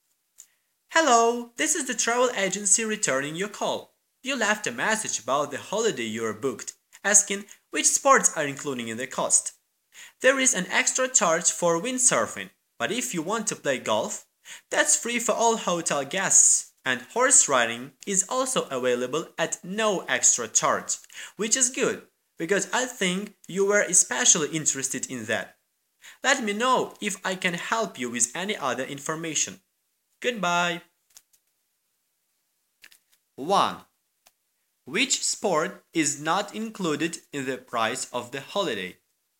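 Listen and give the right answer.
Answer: windsurfing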